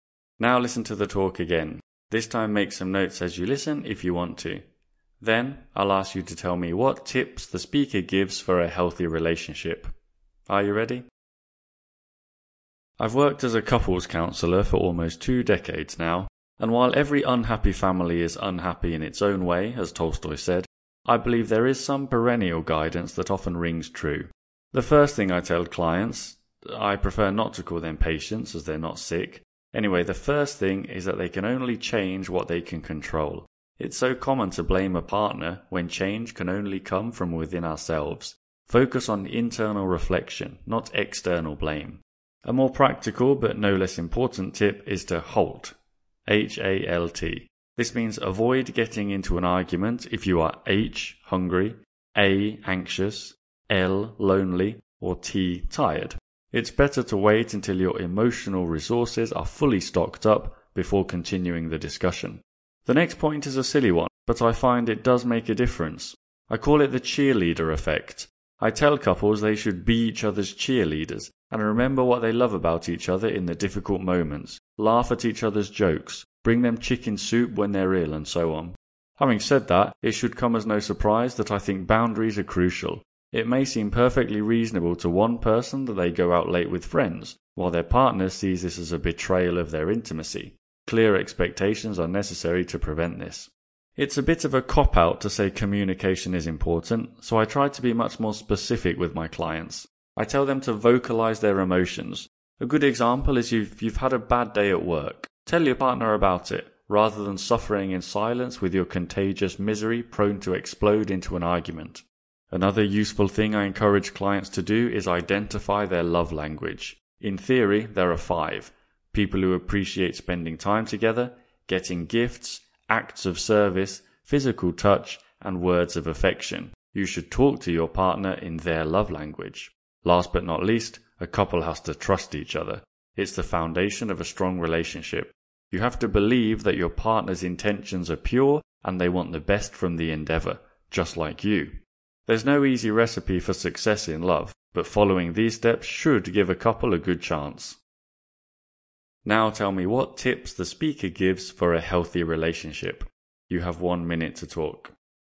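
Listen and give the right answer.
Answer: Change only what you can control; HALT (don't argue when hungry, anxious, lonely or tired); be each other's cheerleaders; set clear boundaries; vocalize emotions; speak your partner's love language; trust each other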